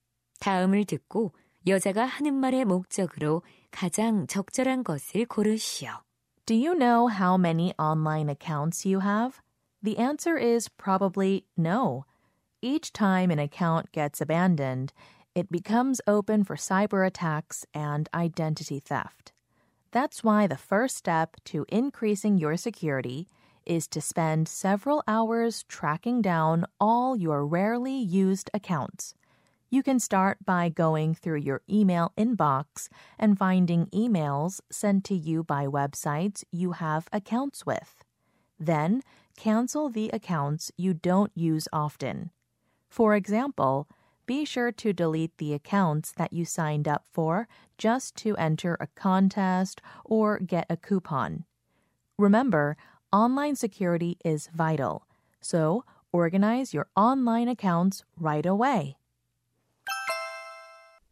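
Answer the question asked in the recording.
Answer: 잘 사용하지 않는 온라인 계정을 정리하도록 권하려고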